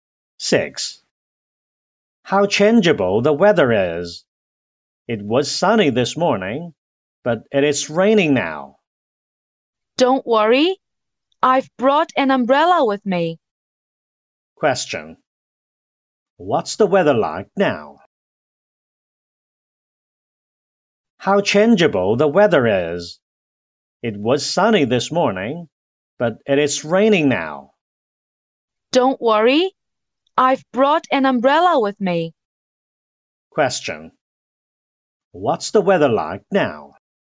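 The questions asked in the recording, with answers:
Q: What's the weather like now?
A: It is raining.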